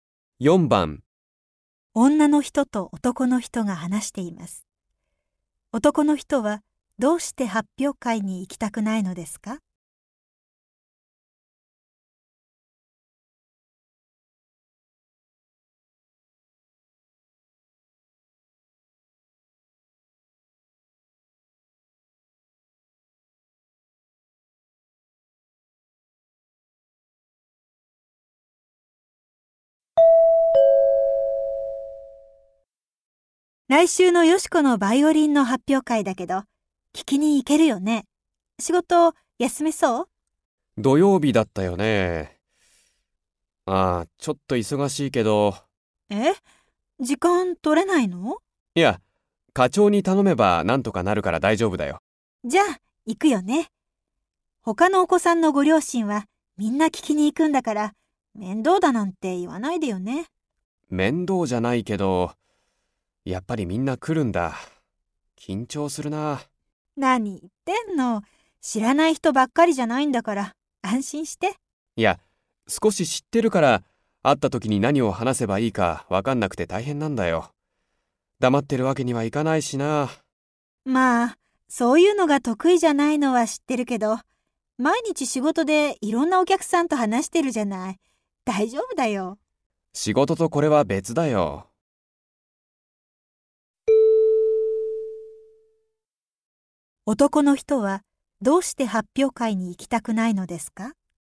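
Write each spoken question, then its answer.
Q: 男の人はどうして発表会に行きたくないのですか?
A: 知っている人に会ったとき何を話せばいいか分からないから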